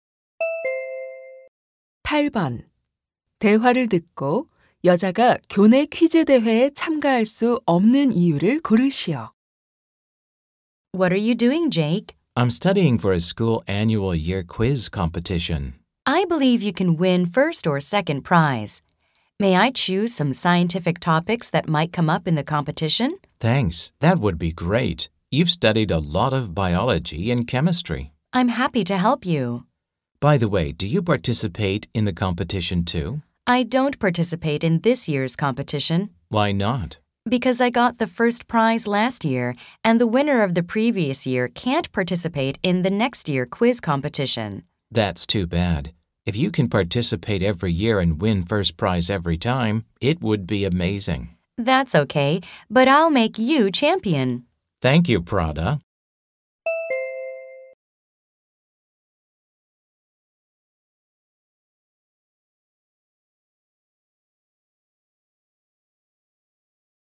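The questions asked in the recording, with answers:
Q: 대화를 듣고 여자가 교내 퀴즈 대회에 참가할 수 없는 이유를 고르시오.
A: 작년에 1등을 해서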